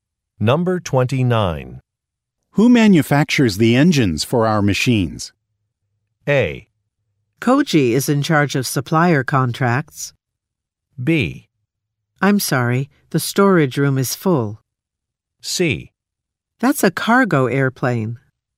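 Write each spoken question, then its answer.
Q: Who manufactures the engines for our machines?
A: A: Koji is in charge of supplier contracts.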